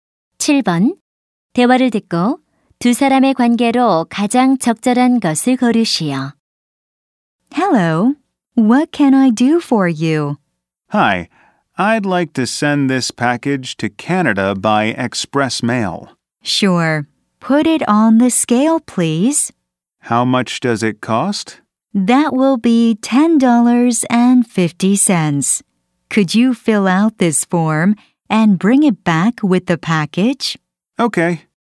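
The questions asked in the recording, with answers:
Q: 대화를 듣고 두 사람의 관계로 가장 적절한 것을 고르시오.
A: 우체국 직원과 손님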